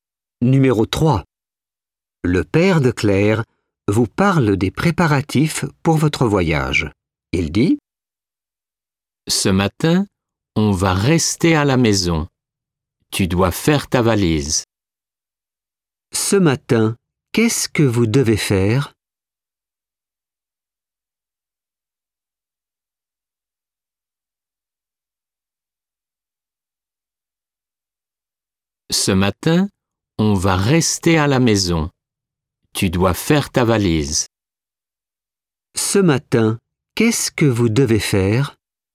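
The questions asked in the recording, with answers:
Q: Ce matin, qu'est-ce que vous devez faire?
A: Faire votre valise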